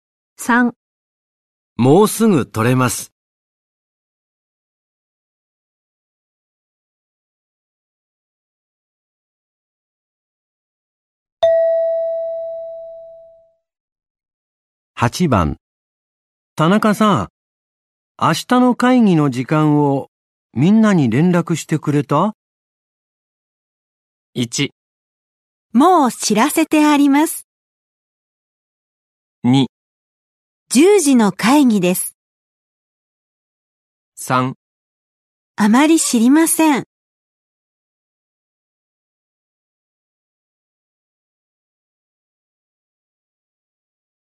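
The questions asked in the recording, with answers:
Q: 田中さん、明日の会議の時間をみんなに連絡してくれた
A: 1: もう知らせてあります。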